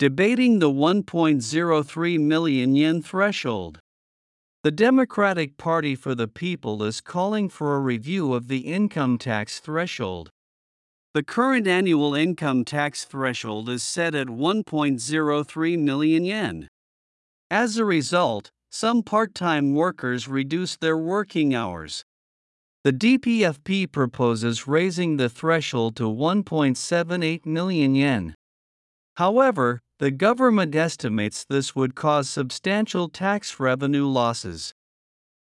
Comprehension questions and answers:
次の各質問の答えを探しながら聞きましょう。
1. Who is proposing changes to the income tax threshold?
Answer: The Democratic Party for the People.

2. What is the current income tax threshold?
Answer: 1.03 million yen.

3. How does the current threshold affect part-time workers?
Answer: They reduce their working hours.

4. The current ( ) 1.03 million yen.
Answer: annual income tax threshold is set at

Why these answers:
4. アメリカ英語の発音では、Tの直後に弱い母音が続くときはTがDのように聞こえることが多いです。 set at」と「said at」を「子音+母音のリンキング」で発音すると、音で区別するのが非常に困難です。 こういうときは、英文全体の意味を考えると、A)が正解であることが容易にわかります。 A) is set at : 現在の年間所得税基準額は103万円に設定されている B) is said at : 現在の年間所得税基準額は103万円だと言われている。※said atが意味不明。 B)の「言われている」は「〜だと言われているが、真実かどうかは定かではない」というニュアンスになります。 「103万円までが非課税」という事実を「不確かな伝聞」として表現している点で不適切です。 また、「said at」という表現も不自然です。

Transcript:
Debating the 1.03-Million-Yen Threshold
The Democratic Party for the People is calling for a review of the income tax threshold.
The current annual income tax threshold is set at 1.03 million yen.
As a result, some part-time workers reduce their working hours.
The DPFP proposes raising the threshold to 1.78 million yen.
However, the government estimates this would cause substantial tax revenue losses.